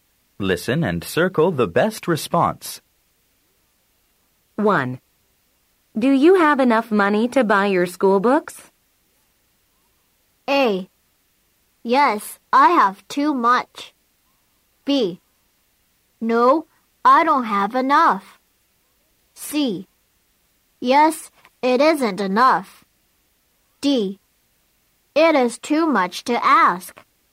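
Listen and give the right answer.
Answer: B: No, I don't have enough.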